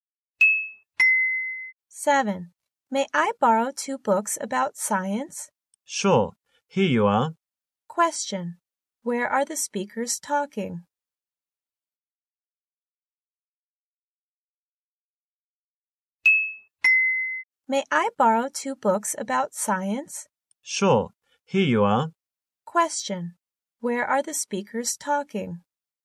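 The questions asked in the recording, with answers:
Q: Where are the speakers talking?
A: In a library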